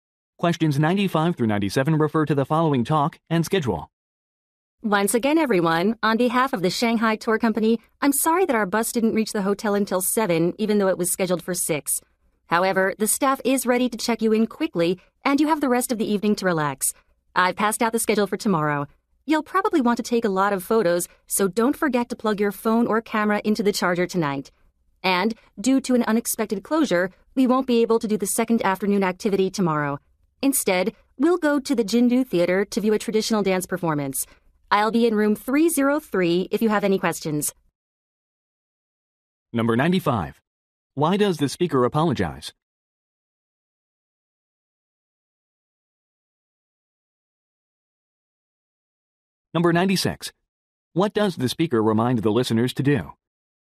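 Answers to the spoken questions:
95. The bus arrived at the hotel late
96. Charge their phones or cameras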